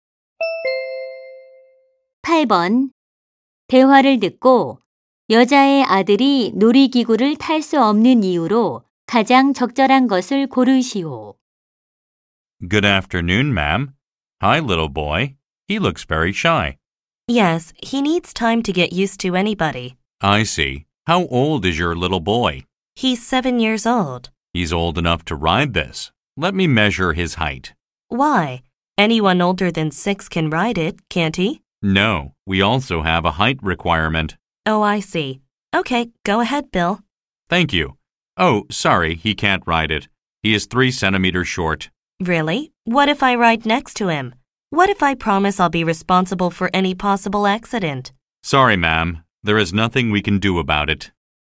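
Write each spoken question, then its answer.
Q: 대화를 듣고 여자의 아들이 놀이기구를 탈 수 없는 이유로 가장 적절한 것을 고르시오.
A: 키가 3센티미터 모자라서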